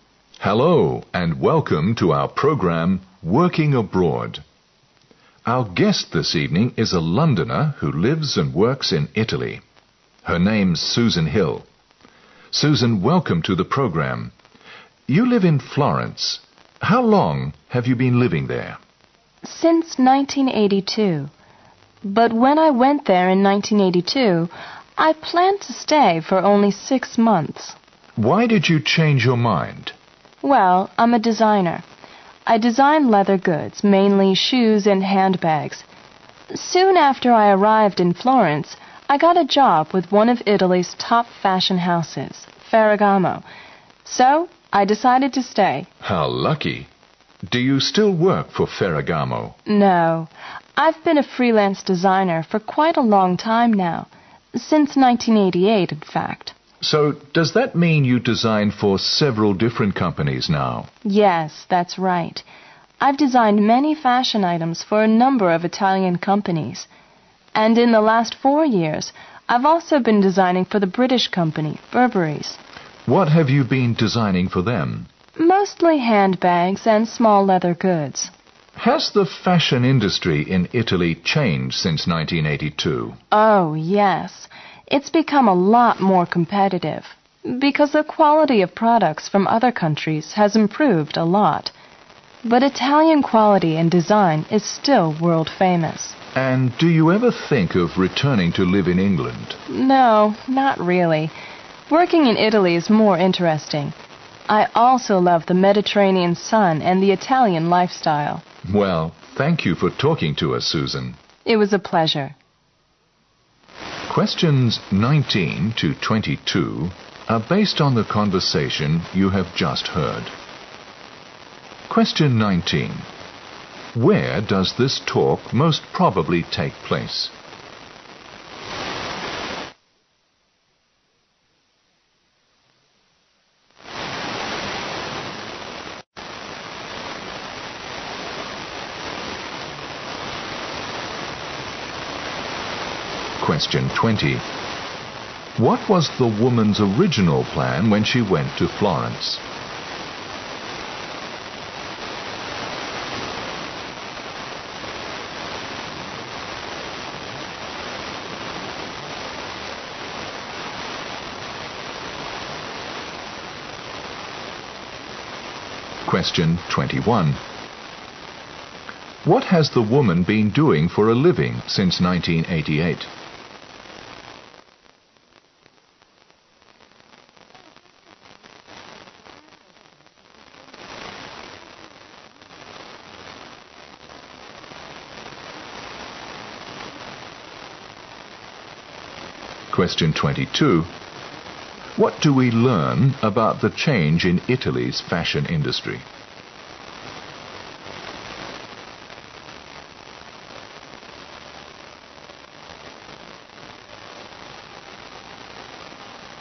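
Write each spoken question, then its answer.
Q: Where does this talk most probably take place?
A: In a radio or TV program studio

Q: What was the woman's original plan when she went to Florence?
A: To stay for only six months

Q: What has the woman been doing for a living since 1988?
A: Working as a freelance designer

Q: What do we learn about the change in Italy's fashion industry?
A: It has become much more competitive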